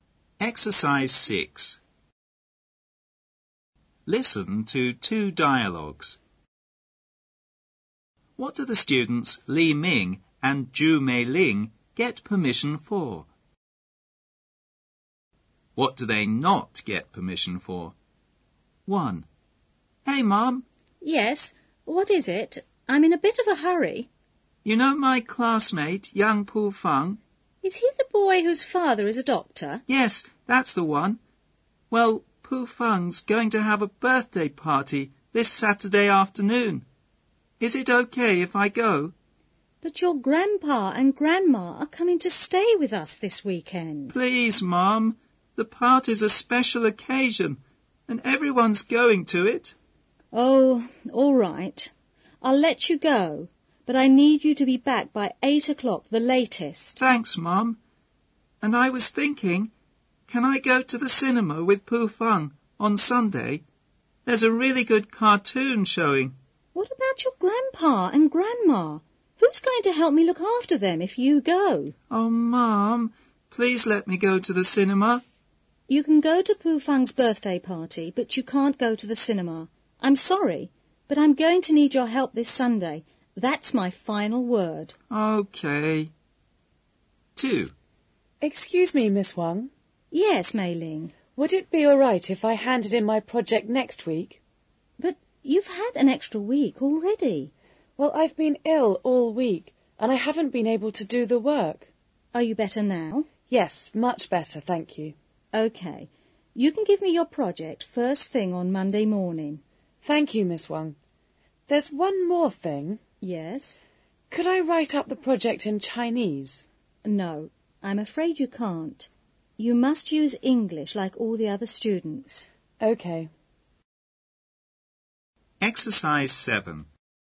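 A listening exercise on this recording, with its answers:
Listen to two dialogues.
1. What do the students LiMing and Zhu Meiling get permission for?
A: Li Ming: to go to Pu Feng's birthday party; Zhu Meiling: to hand in her project later (on Monday)

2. What do they not get permission for?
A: Li Ming: to go to the cinema on Sunday; Zhu Meiling: to write the project in Chinese

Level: 高中英语必修模块2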